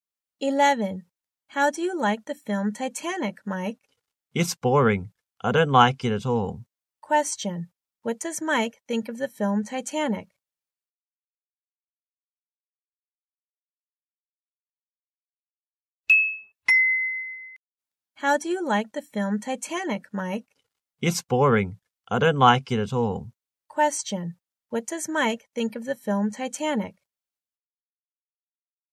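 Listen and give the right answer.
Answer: It's boring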